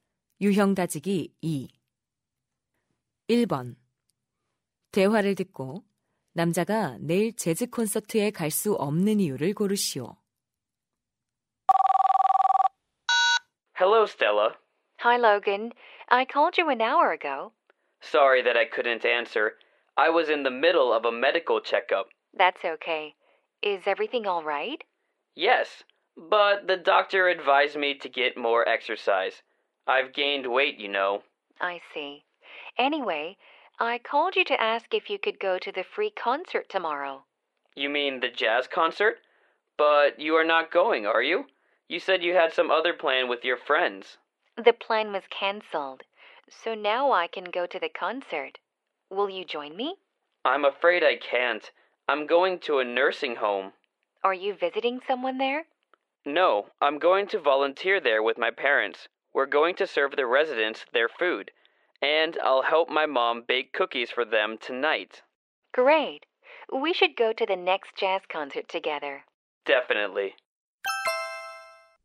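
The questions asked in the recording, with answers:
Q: 대화를 듣고 남자가 내일 재즈 콘서트에 갈 수 없는 이유를 고르시오.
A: 부모님과 양로원에 봉사활동을 하러 가야 해서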